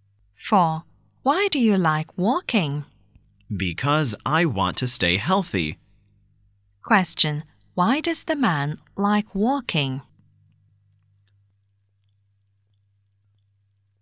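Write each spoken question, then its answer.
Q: Why does the man like walking?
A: To stay healthy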